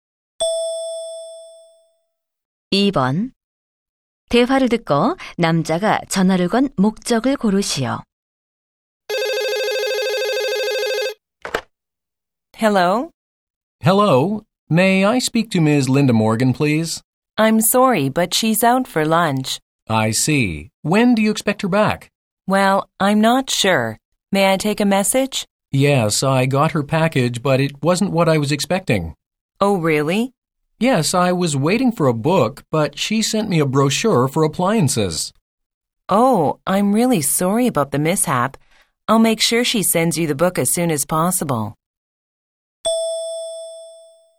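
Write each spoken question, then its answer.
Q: 대화를 듣고 남자가 전화를 건 목적을 고르시오.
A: 잘못 배송된 물건(책 대신 가전 안내책자)을 알리려고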